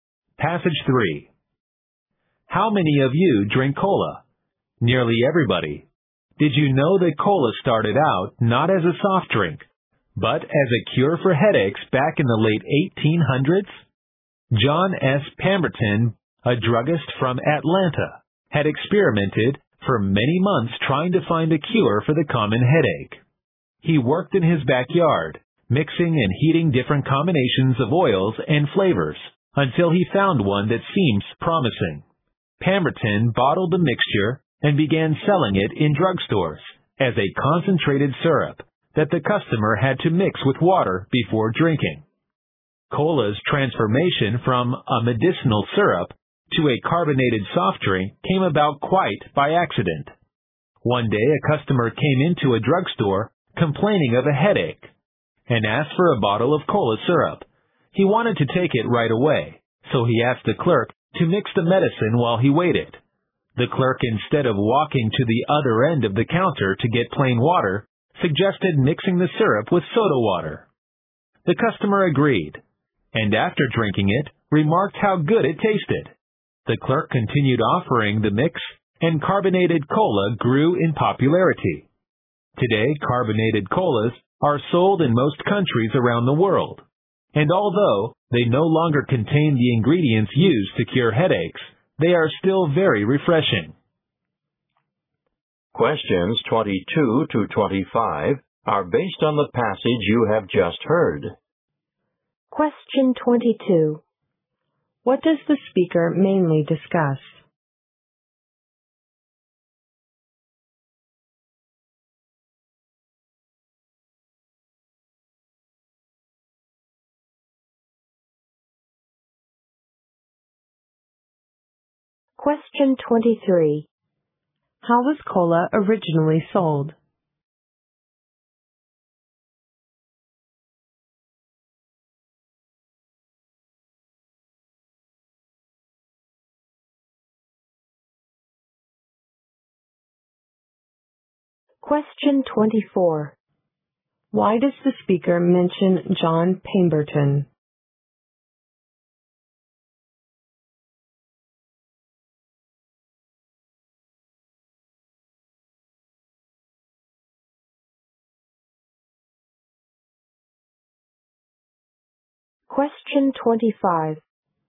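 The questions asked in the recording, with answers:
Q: What does the speaker mainly discuss?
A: The origin of cola.

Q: How was cola originally sold?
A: As a concentrated syrup in drugstores, to be mixed with water.

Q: Why does the speaker mention John Pemberton?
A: He created cola as a cure for headaches.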